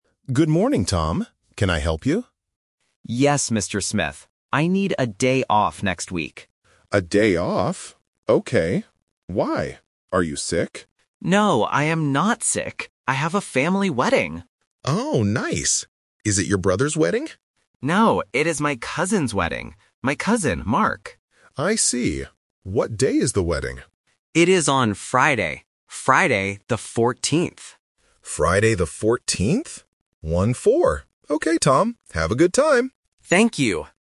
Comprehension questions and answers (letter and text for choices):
Listen to the conversation between Tom and his manager. Choose the correct answer (A, B, or C) for each question.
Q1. Why does Tom need a day off?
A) He is sick.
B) He has a family wedding.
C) He wants to sleep.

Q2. Whose wedding is it?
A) His brother's wedding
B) His cousin's wedding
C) His uncle's wedding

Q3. What day is the wedding?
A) Friday the 4th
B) Friday the 14th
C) Thursday the 14th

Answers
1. B) He has a family wedding.
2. B) His cousin's wedding
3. B) Friday the 14th

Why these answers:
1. The manager asks, "Are you sick?" (Option A is the trap). Tom says, "No, I am not sick. I have a family wedding." Option C (He wants to sleep) is never mentioned.
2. The manager guesses, "Is it your brother's wedding?" (Option A is the trap). Tom corrects him and says, "No, it is my cousin's wedding." Option C (uncle's wedding) is a different extended family word to act as a distractor.
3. Tom says clearly, "It is on Friday. Friday, the 14th." The manager repeats it and says the numbers "One-four" to confirm. Option A (Friday the 4th) is a phonetic trap for the number 14. Option C (Thursday the 14th) is a trap for the day of the week.